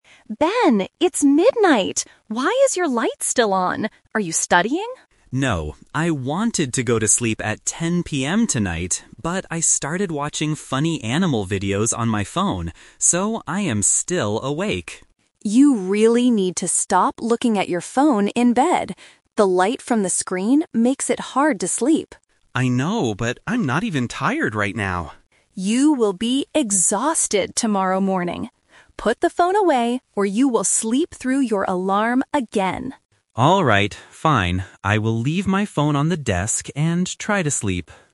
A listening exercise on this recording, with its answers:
Listen to the conversation between a sister and her brother. Choose the correct answer (A, B, or C) for each question.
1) What did Ben originally plan to do at 10 PM?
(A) Study for his classes.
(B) Watch animal videos.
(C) Go to sleep.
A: Go to sleep.

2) What is Ben doing right now?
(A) He is studying.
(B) He is using his phone.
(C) He is fixing his alarm.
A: He is using his phone.

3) Where is Ben going to put his phone?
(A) On his bed.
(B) On the desk.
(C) In his bag.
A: On the desk.

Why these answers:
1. Ben says, "I wanted to go to sleep at 10 PM tonight, but...". Option (A) is a trap; Emma asks if he is studying, but he says "No". Option (B) is also a trap; he is watching videos now, but that was not his original plan for 10 PM.
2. Ben admits he is awake because he is "watching funny animal videos on my phone". Option (A) is the trap mentioned above. Option (C) is a trap; Emma mentions his alarm, but he is not fixing it.
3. At the end of the conversation, Ben agrees and says, "I will leave my phone on the desk." Option (A) is a trap; he is currently on his bed, but Emma tells him to put it away. Option (C) is a plausible place to put a phone, but it is not mentioned in the audio.

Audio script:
Emma: Ben, it's midnight! Why is your light still on? Are you studying?
Ben: No, I wanted to go to sleep at 10 PM tonight, but I started watching funny animal videos on my phone. So, I am still awake.
Emma: You really need to stop looking at your phone in bed. The light from the screen makes it hard to sleep.
Ben: I know, but I'm not even tired right now.
Emma: You will be exhausted tomorrow morning! Put the phone away, or you will sleep through your alarm again.

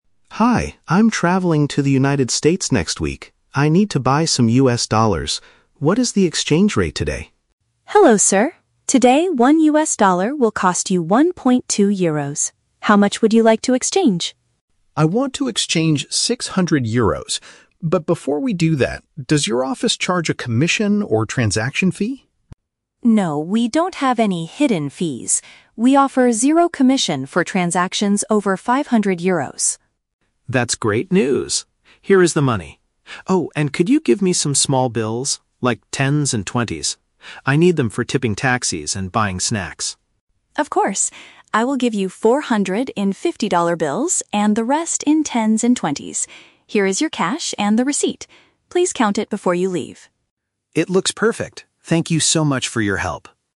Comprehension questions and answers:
Listen to a conversation between a tourist and a currency exchange clerk. For each question, choose the correct answer (A, B, or C).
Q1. Why does Alex want to exchange his money today?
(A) He is planning a holiday to an overseas country.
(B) He wants to invest in a foreign business online.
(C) He needs to pay a fee to renew his travel passport.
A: He is planning a holiday to an overseas country.

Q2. What is the store's policy on extra service charges?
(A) They charge a small fee for changing large amounts of cash.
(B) They do not require customers to pay additional costs for this amount.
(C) They offer a cheaper rate if the customer pays with a credit card.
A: They do not require customers to pay additional costs for this amount.

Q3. Why does Alex ask for smaller notes?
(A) He is worried that large bills are easily stolen by pickpockets.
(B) The clerk does not have enough fifty-dollar bills in the register.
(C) He wants to give extra money to drivers and buy light meals.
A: He wants to give extra money to drivers and buy light meals.

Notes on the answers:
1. Alex states, "I'm traveling to the United States next week" (planning a holiday to an overseas country). Option (B) is a trap; investing is a reason to exchange money, but it is not his reason. Option (C) is a trap; renewing a passport is a travel-related task, but it is not mentioned in the audio.
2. Maria explains that they offer "zero commission for transactions over 500 Euros." Since Alex is exchanging 600 Euros, he does not have to pay additional costs. Option (A) is a trap; it is the exact opposite of their policy (they drop the fee for large amounts, not charge for it). Option (C) is not mentioned.
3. Alex explicitly says he needs tens and twenties for "tipping taxis" (giving extra money to drivers) and "buying snacks" (buying light meals). Option (A) is a logical real-world concern, but he never mentions thieves or pickpockets. Option (B) is a trap; Maria actually gives him four hundred dollars in "fifty-dollar bills", so she clearly has enough of them.

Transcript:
Alex: Hi, I'm traveling to the United States next week. I need to buy some US dollars. What is the exchange rate today?
Maria: Hello, sir. Today, one US dollar will cost you one point two Euros. How much would you like to exchange?
Alex: I want to exchange 600 Euros. But before we do that, does your office charge a commission or transaction fee?
Maria: No, we don't have any hidden fees. We offer zero commission for transactions over 500 Euros.
Alex: That's great news. Here is the money. Oh, and could you give me some small bills? Like tens and twenties? I need them for tipping taxis and buying snacks.
Maria: Of course. I will give you four hundred in fifty-dollar bills, and the rest in tens and twenties. Here is your cash and the receipt.

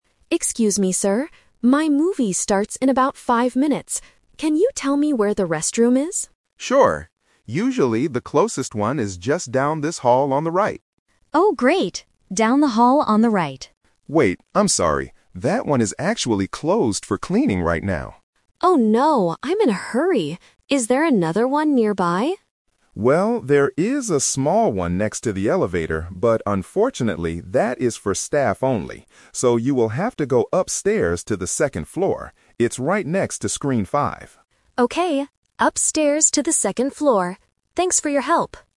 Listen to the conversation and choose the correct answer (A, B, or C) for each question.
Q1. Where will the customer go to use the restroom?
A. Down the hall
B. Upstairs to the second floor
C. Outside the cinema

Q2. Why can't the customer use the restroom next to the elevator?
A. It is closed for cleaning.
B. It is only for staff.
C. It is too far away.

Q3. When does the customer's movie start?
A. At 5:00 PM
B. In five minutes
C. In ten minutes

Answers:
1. Upstairs to the second floor
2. It is only for staff.
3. In five minutes

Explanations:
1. The guard mentions the restroom "down this hall" first (Option A is the trap), but it is closed. He finally says, "So, you will have to go upstairs to the second floor." Option C is not mentioned.
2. The guard says the restroom next to the elevator is "for staff only." Option A is the trap because "closed for cleaning" is the reason for the first restroom down the hall. Option C is not mentioned.
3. At the beginning of the conversation, the customer says, "My movie starts in about five minutes." Option A is the trap because it uses the number "five" but changes the meaning to a specific time. Option C is not mentioned.

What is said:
Customer: Excuse me, sir. My movie starts in about five minutes. Can you tell me where the restroom is?
Security Guard: Sure. Usually, the closest one is just down this hall on the right.
Customer: Oh, great. Down the hall on the right.
Security Guard: Wait, I'm sorry. That one is actually closed for cleaning right now.
Customer: Oh no, I'm in a hurry. Is there another one nearby?
Security Guard: Well, there is a small one next to the elevator, but unfortunately, that is for staff only. So, you will have to go upstairs to the second floor. It's right next to Screen 5.

